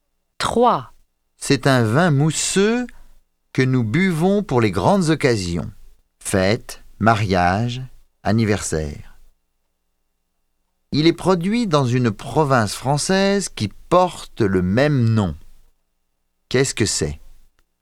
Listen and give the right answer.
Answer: C'est du champagne.